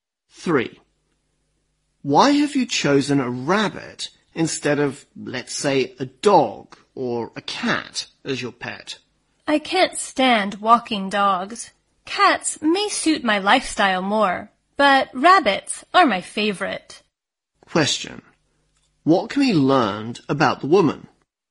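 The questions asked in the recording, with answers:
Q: What can be learned about the woman?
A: She likes rabbits best as pets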